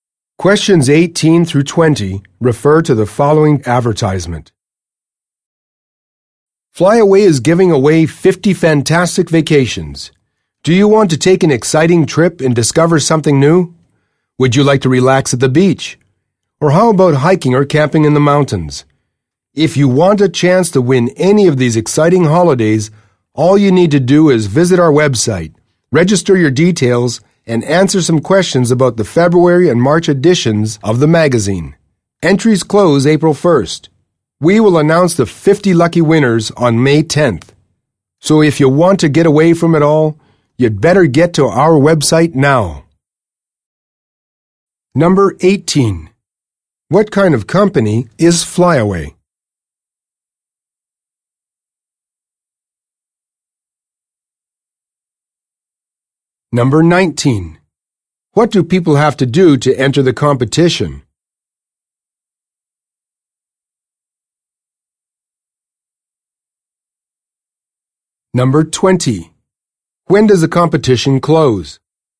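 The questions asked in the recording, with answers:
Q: What do people have to do to enter the competition?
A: Register on the website and answer questions about the magazine

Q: When does the competition close?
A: April 1st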